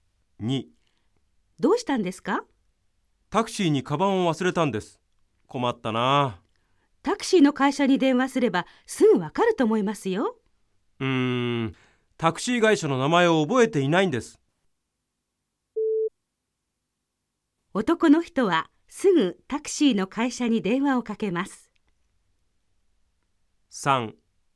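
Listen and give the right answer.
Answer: ×(正しくない)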